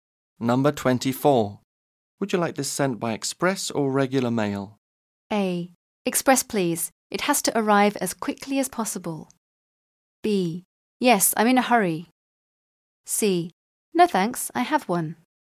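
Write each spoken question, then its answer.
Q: Would you like this sent by express or regular mail?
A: A: Express, please. It has to arrive as quickly as possible.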